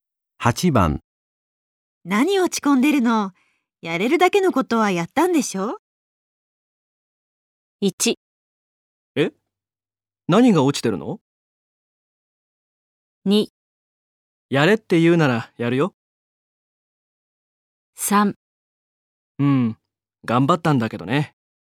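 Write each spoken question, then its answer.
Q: 何落ち込んでるの?やれるだけのことはやったんでしょ?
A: 3: うん、頑張ったんだけどね。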